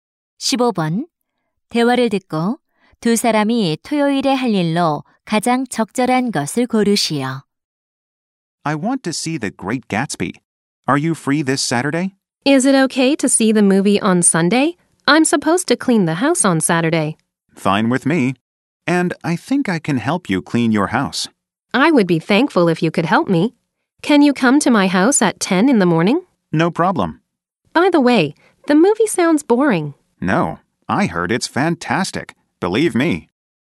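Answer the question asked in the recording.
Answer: 집 청소하기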